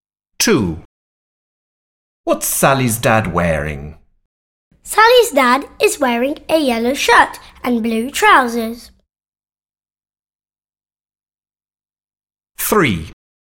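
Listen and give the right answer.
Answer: a yellow shirt and blue trousers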